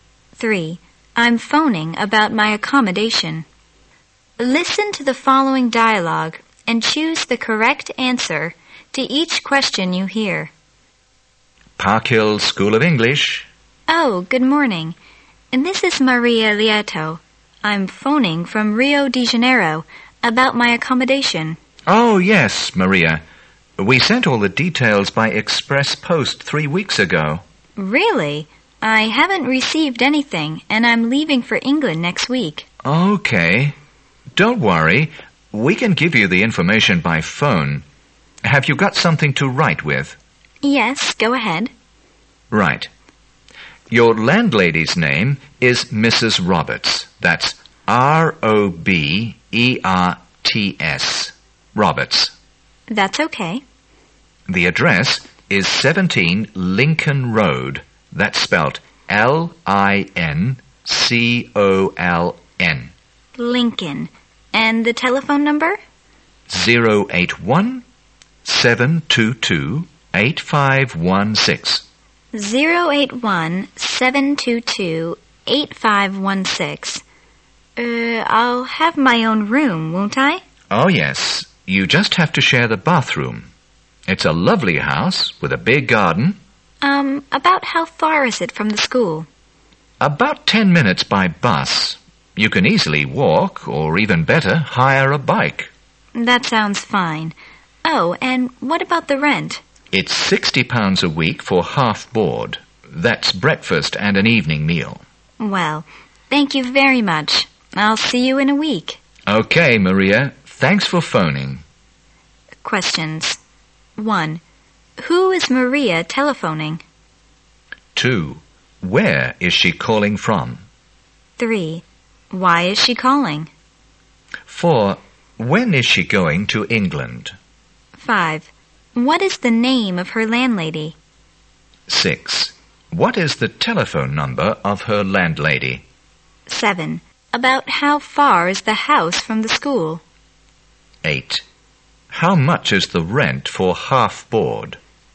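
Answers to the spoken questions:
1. Park Hill School of English
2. Rio de Janeiro
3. To ask about her accommodation
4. Next week
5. Mrs. Roberts
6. 081-722-8516
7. About 10 minutes by bus
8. £60 a week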